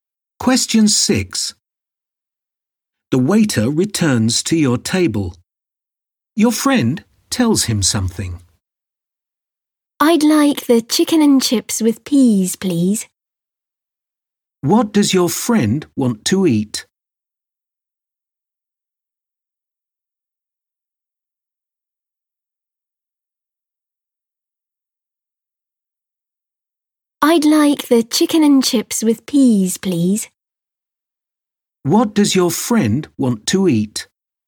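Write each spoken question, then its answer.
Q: What does your friend want to eat?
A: Chicken and chips with peas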